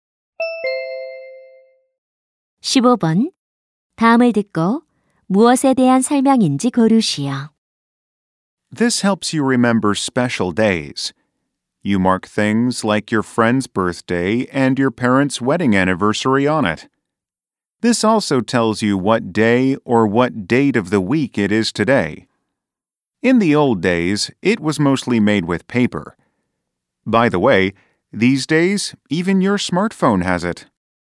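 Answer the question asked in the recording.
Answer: 달력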